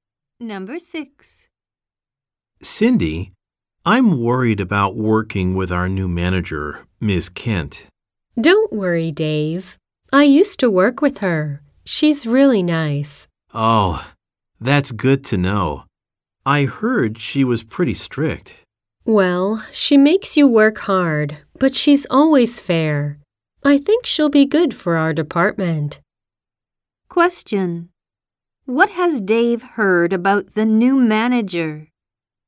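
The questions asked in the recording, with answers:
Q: What has Dave heard about the new manager?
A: She is pretty strict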